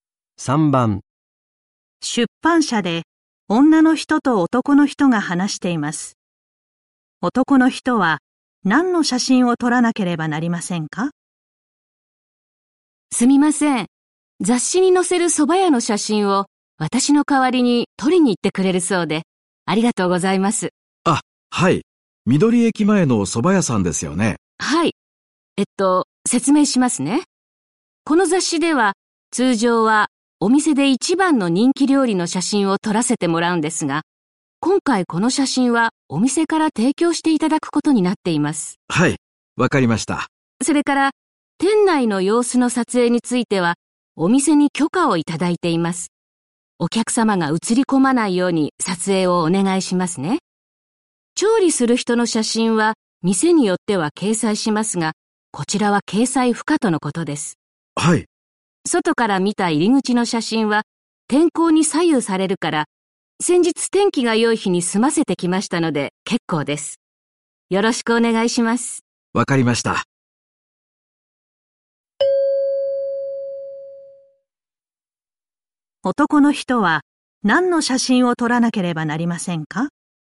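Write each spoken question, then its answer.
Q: 男の人は何の写真を撮らなければなりませんか?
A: 店内の様子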